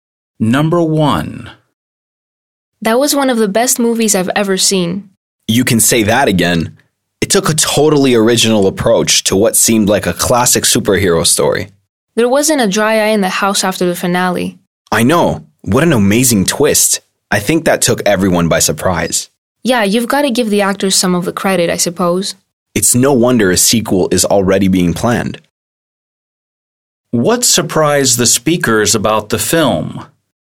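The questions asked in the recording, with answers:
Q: What surprised the speakers about the film?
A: The twist at the end (the finale)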